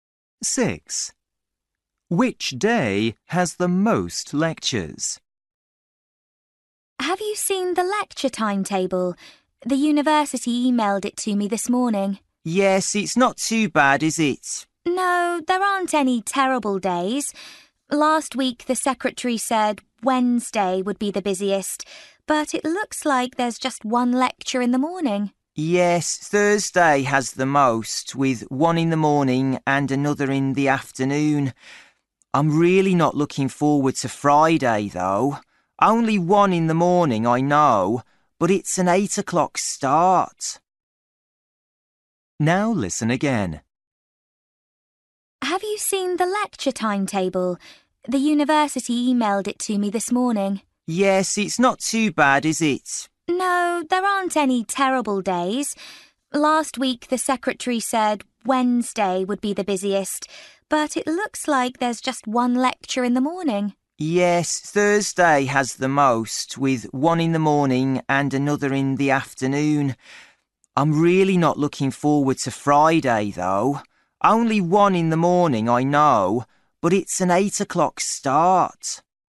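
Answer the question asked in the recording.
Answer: Thursday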